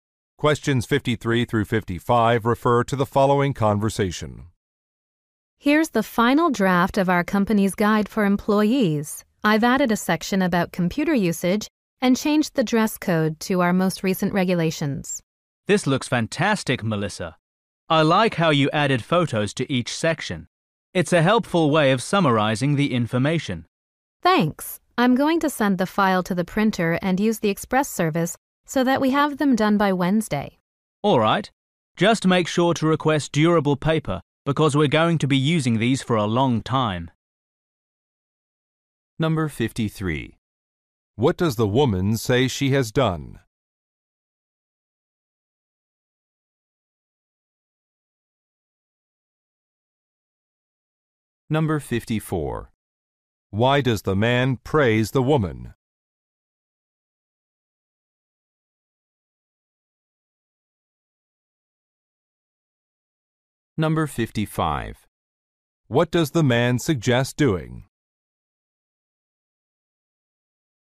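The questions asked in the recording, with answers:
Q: What does the woman say she has done?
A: Updated the employee guide

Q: Why does the man praise the woman?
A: She added photos to each section

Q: What does the man suggest doing?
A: Requesting durable paper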